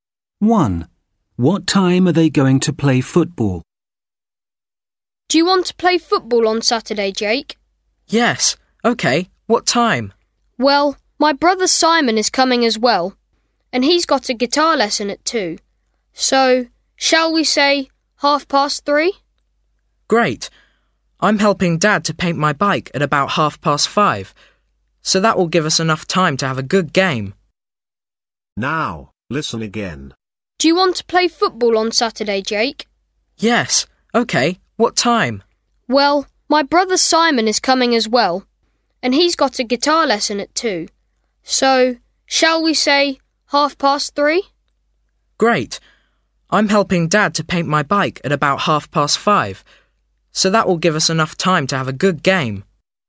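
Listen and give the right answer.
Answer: 3:30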